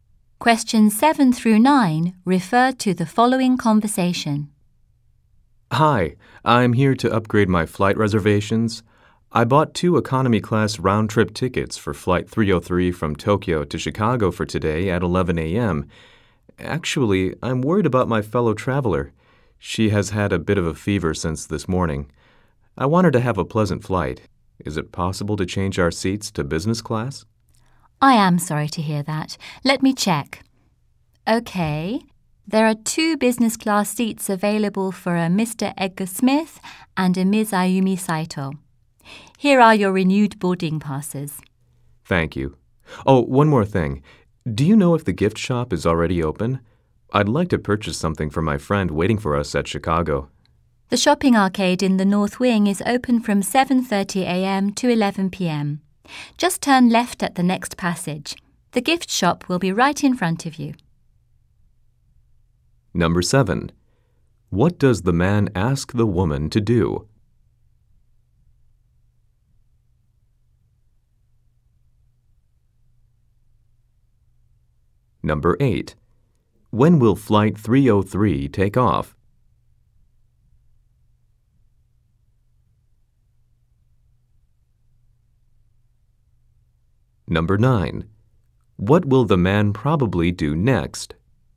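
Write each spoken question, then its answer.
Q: What does the man ask the woman to do?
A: Upgrade their seats to business class

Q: When will flight 303 take off?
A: At 11 a.m. today

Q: What will the man probably do next?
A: Go to the gift shop to buy a present for his friend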